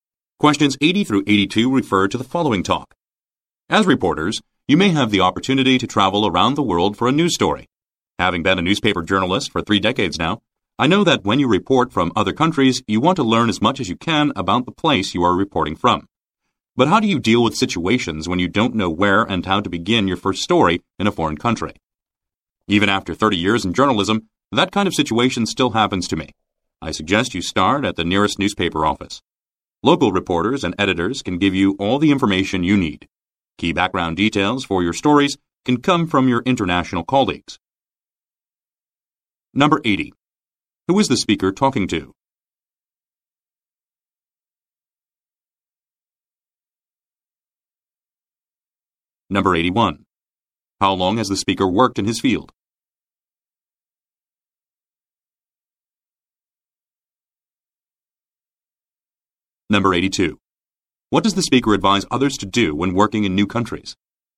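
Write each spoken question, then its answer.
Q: Who is the speaker talking to?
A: Reporters

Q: How long has the speaker worked in his field?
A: 30 years

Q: What does the speaker advise others to do when working in new countries?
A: Start at the nearest newspaper office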